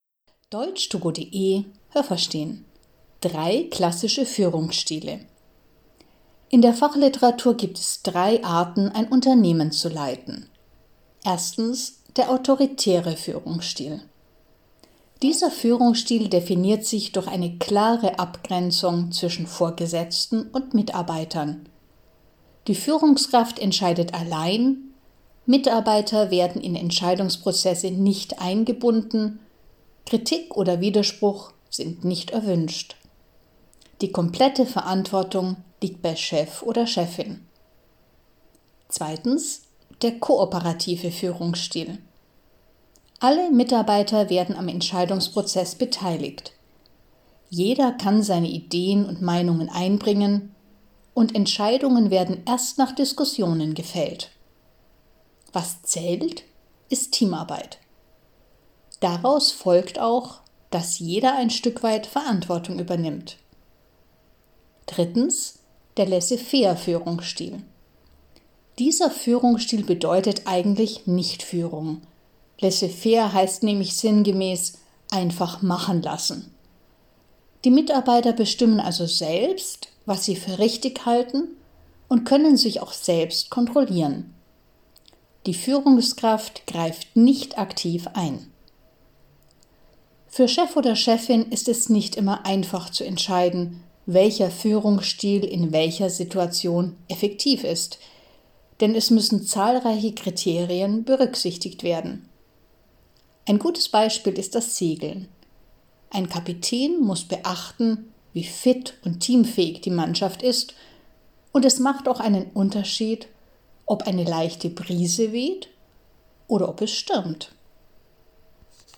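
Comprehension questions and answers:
Haben Sie das gehört? Stimmt diese Aussage?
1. Beim autoritären Führungsstil herrscht eine Distanz zwischen Führungskraft und Mitarbeiter.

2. Beim autoritären Führungsstil können Mitarbeiter nur in Einzelfällen mitentscheiden.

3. Im Vergleich zum autoritären Führungsstil kann sich beim kooperativen Führungsstil jeder am Entscheidungsprozess beteiligen.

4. Beim autoritären und beim kooperativen Führungsstil trägt die Führungskraft die volle Verantwortung.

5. Beim Laissez-faire-Führungsstil arbeiten die Mitarbeiter sehr selbstständig und haben die völlige Entscheidungsfreiheit.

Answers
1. Ja, das habe ich gehört.
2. Nein, das habe ich nicht gehört.
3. Ja, das habe ich gehört.
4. Nein, das habe ich nicht gehört.
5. Ja, das habe ich gehört.

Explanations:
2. Mitarbeiter werden bei diesem Führungsstil bei Entscheidungsprozessen nicht eingebunden.
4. 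Beim kooperativen Führungsstil tragen Mitarbeiter und Führungskraft die Verantwortung.

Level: C1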